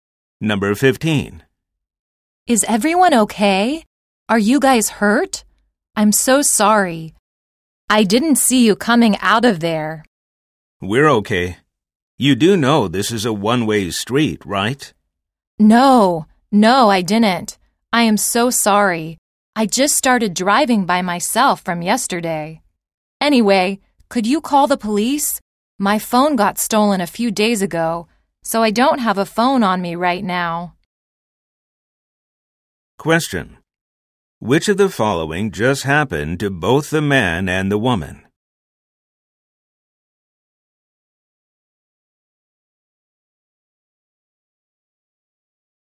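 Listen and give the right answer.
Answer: A car accident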